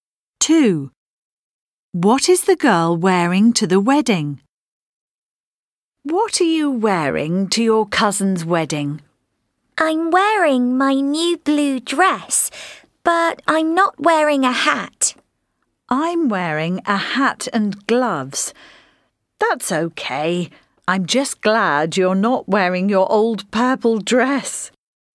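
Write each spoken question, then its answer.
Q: What is the girl wearing to the wedding?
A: Her new blue dress, with no hat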